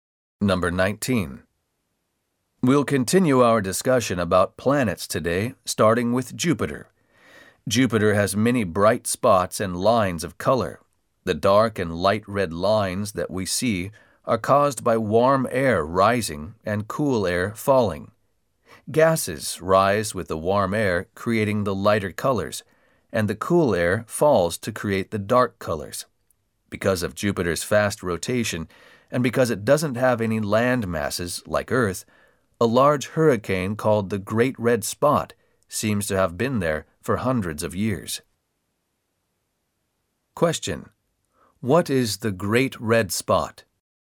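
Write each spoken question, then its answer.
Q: What is the Great Red Spot?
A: A large hurricane on Jupiter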